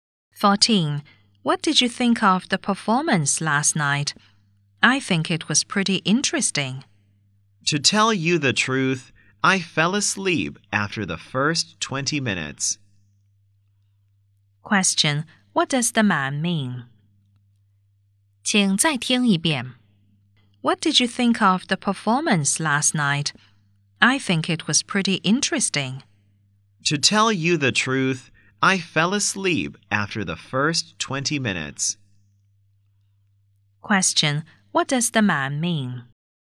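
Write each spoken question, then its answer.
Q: what does the man mean?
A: The performance was boring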